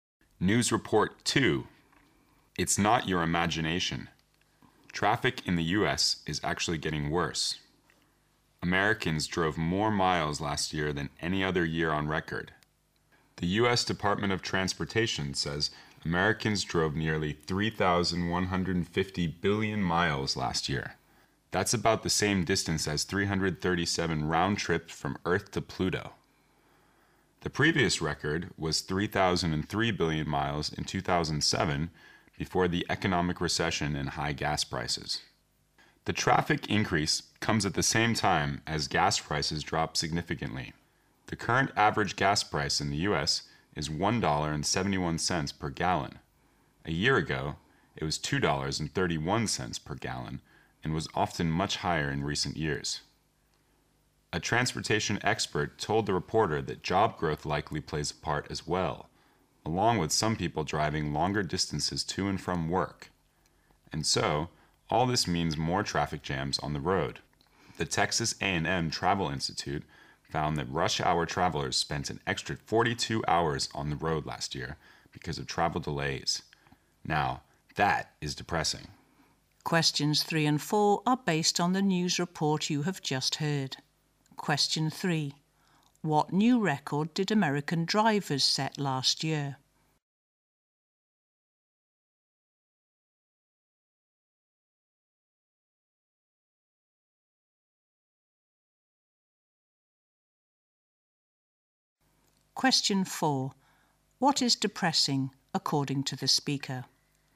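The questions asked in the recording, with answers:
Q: What new record did American drivers set last year?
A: They drove more miles than in any other year (nearly 3,150 billion miles)

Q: What is depressing, according to the speaker?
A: Rush hour travelers spent an extra 42 hours on the road because of delays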